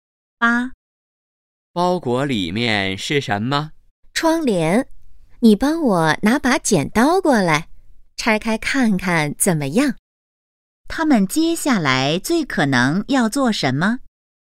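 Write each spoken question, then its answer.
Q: 他们接下来最可能要做什么?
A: 拆包裹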